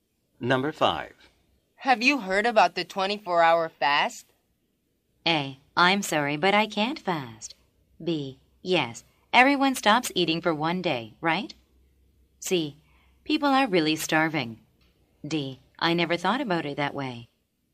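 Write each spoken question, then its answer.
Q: Have you heard about the 24-hour fast?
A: B: Yes, everyone stops eating for one day, right?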